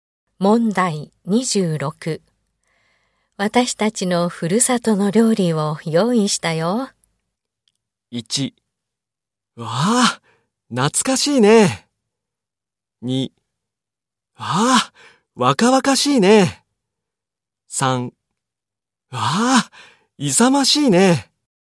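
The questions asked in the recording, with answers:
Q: 私たちのふるさとの料理を用意したよ。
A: 1: わあ、懐かしいね。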